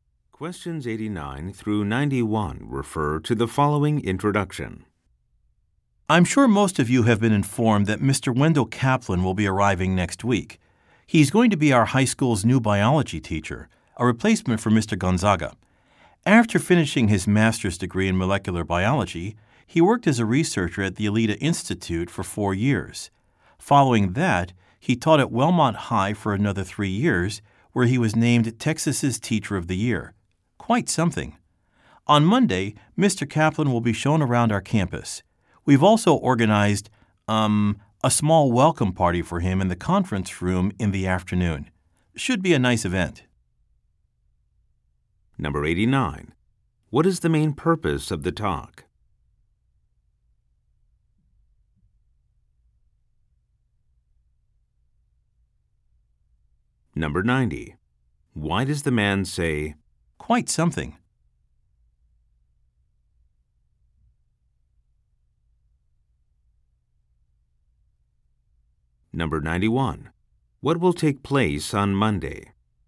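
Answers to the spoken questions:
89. To introduce a new biology teacher
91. A campus tour and a welcome party for Mr. Kaplan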